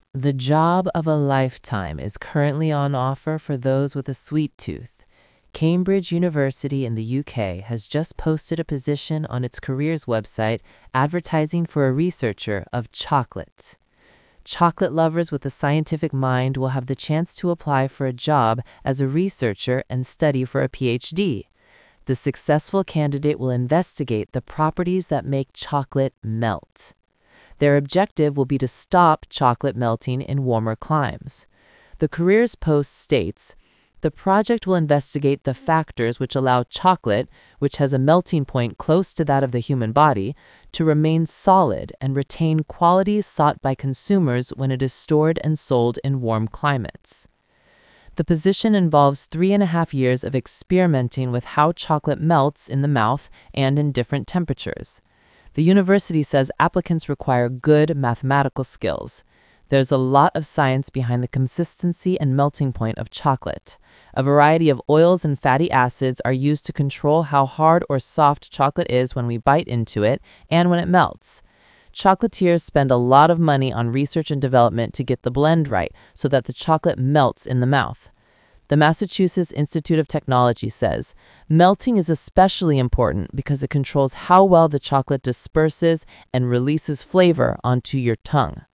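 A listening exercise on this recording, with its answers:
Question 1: What kind of mind will chocolate-loving applicants need?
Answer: a scientific mind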